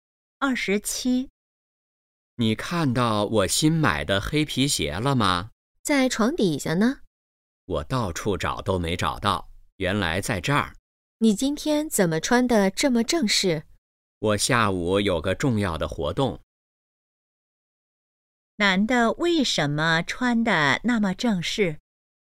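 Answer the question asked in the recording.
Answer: 下午有个重要的活动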